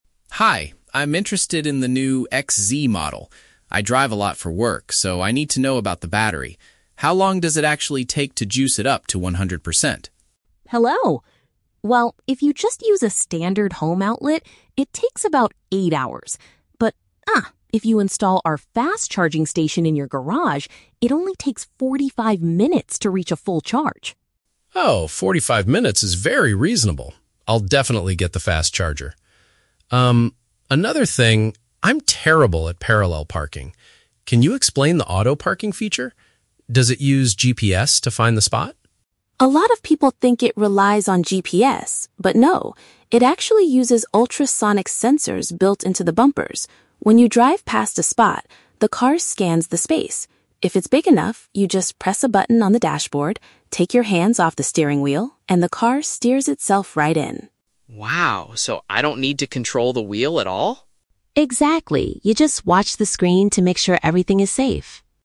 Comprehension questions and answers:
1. How fast can the vehicle be fully charged at home with the special equipment?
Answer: In less than an hour.

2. What technology does the vehicle use to park itself?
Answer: Devices that detect objects near the bumpers.

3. What is the driver expected to do while the car is parking?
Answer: Monitor the display panel.

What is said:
Customer: Hi, I'm interested in the new XZ-Model. I drive a lot for work, so I need to know about the battery. How long does it actually take to juice it up to 100%?
Salesperson: Hello! Well, if you just use a standard home outlet, it takes about eight hours. But, ah, if you install our fast-charging station in your garage, it only takes 45 minutes to reach a full charge.
Customer: Oh, 45 minutes is very reasonable. I'll definitely get the fast charger. Um, another thing... I'm terrible at parallel parking. Can you explain the auto-parking feature? Does it use GPS to find the spot?
Salesperson: A lot of people think it relies on GPS, but no. It actually uses ultrasonic sensors built into the bumpers. When you drive past a spot, the car scans the space. If it's big enough, you just press a button on the dashboard, take your hands off the steering wheel, and the car steers itself right in.
Customer: Wow, so I don't need to control the wheel at all?